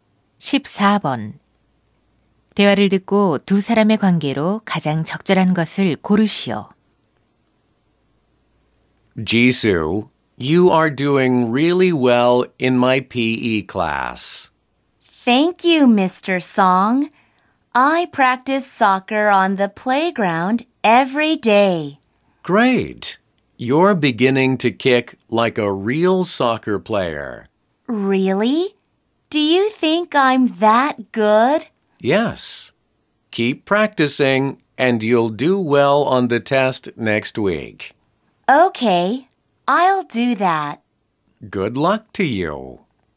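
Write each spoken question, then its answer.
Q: 대화를 듣고 두 사람의 관계로 가장 적절한 것을 고르시오.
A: 체육 교사와 학생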